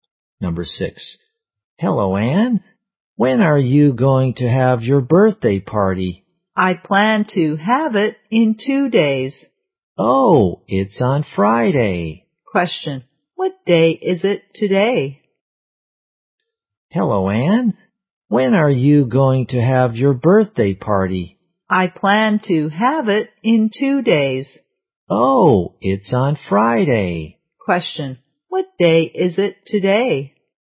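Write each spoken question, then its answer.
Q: Question. What day is it today?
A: Wednesday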